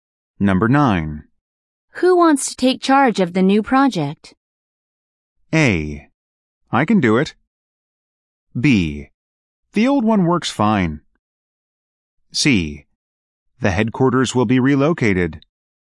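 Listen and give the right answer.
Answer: A: I can do it.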